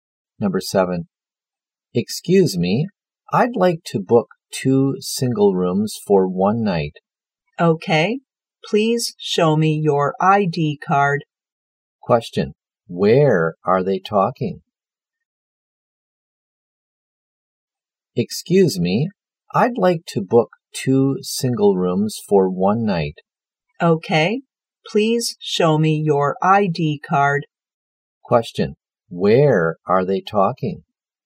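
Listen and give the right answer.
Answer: In a hotel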